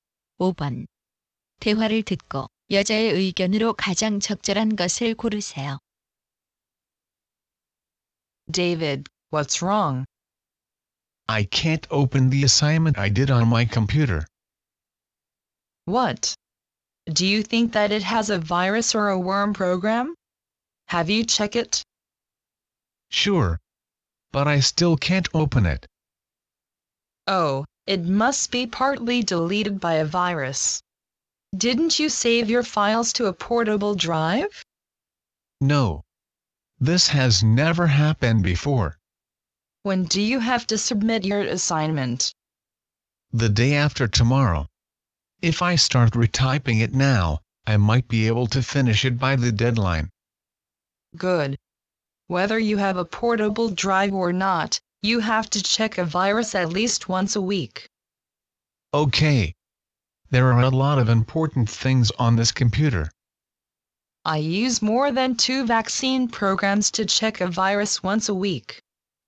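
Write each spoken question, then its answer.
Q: 대화를 듣고 여자의 의견으로 가장 적절한 것을 고르세요.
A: 적어도 일주일에 한 번은 바이러스 검사를 해야 한다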